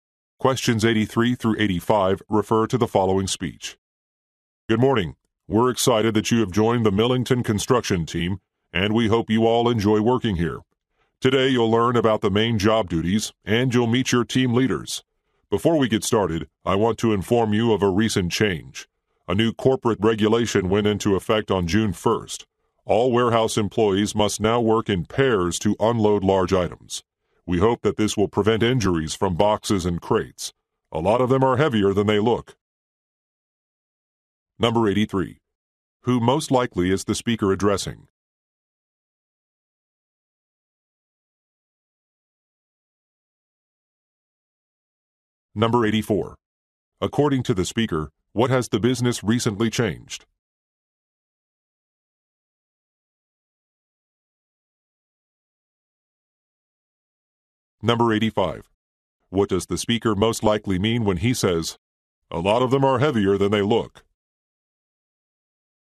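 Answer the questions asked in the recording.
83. New employees
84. Warehouse employees must unload large items in pairs
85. The rule is needed to prevent injuries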